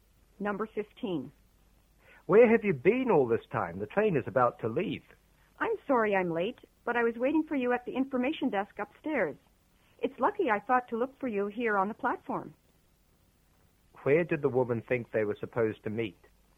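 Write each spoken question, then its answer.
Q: Where did the woman think they were supposed to meet?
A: At the information desk upstairs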